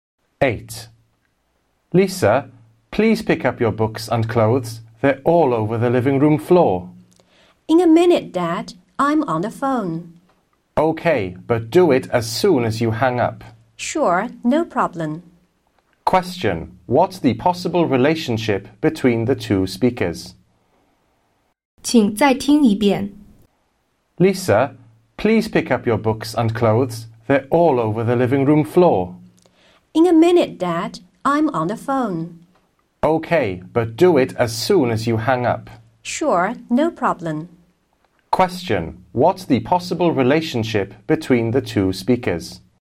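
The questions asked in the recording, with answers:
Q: What's the possible relationship between the two speakers?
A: Father and daughter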